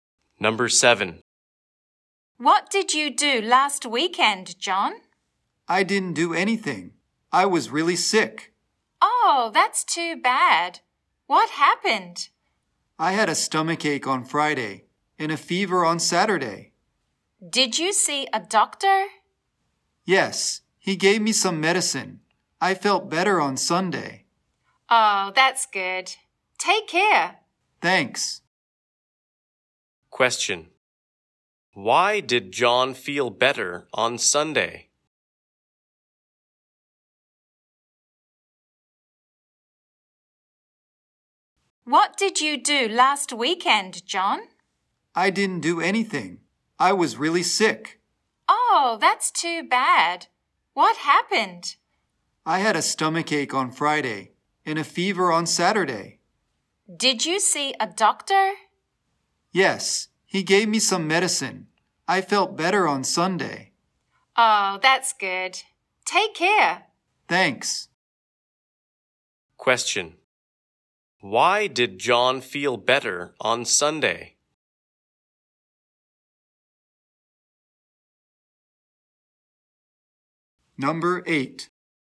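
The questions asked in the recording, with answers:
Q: Why did John feel better on Sunday?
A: A doctor gave him some medicine.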